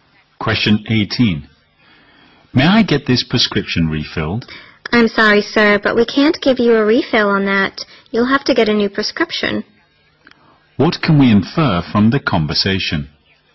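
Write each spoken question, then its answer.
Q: What can we infer from the conversation?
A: The man needs a new prescription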